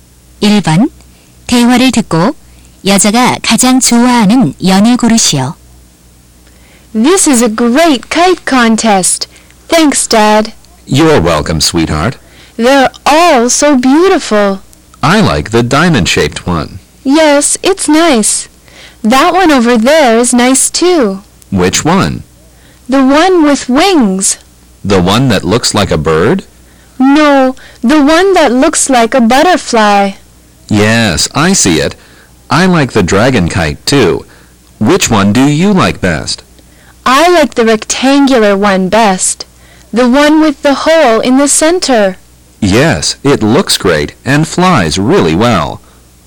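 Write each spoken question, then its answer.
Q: 대화를 듣고 여자가 가장 좋아하는 연을 고르시오.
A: 가운데에 구멍이 있는 직사각형 연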